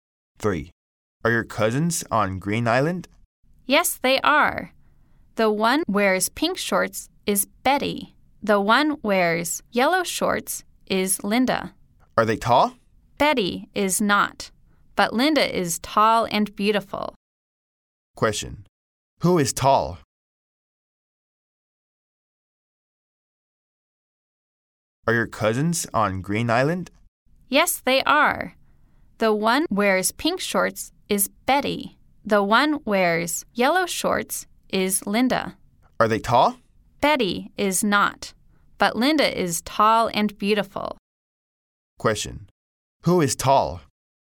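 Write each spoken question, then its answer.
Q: Who is tall?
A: Linda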